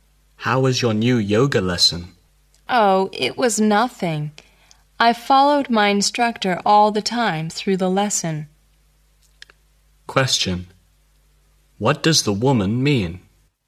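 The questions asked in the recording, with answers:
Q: What does the woman mean?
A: The lesson was easy for her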